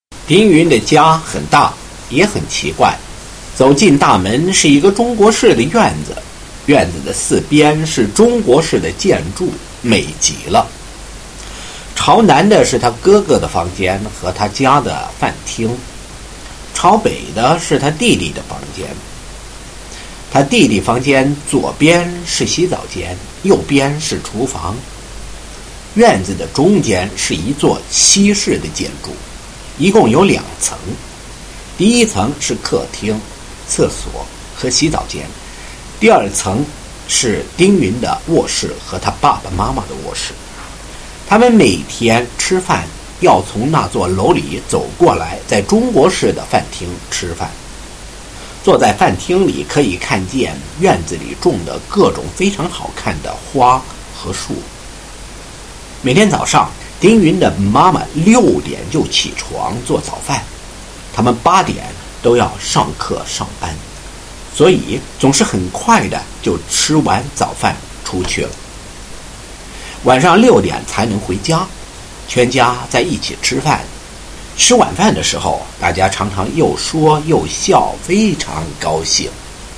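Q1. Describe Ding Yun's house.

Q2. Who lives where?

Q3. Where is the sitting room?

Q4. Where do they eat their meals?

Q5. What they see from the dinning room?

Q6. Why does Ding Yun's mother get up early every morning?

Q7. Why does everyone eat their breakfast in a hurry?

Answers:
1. Big and strange: a Chinese-style courtyard with Chinese-style buildings on four sides and a two-storey Western-style building in the middle.
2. The older brother's room faces south, the younger brother's faces north; Ding Yun and the parents have bedrooms on the second floor of the Western building.
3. On the first floor of the Western-style building in the middle of the courtyard.
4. In the Chinese-style dining room on the south side.
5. All kinds of beautiful flowers and trees in the courtyard.
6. To make breakfast (she gets up at 6).
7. Because they all have to be at class or work by 8.

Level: First year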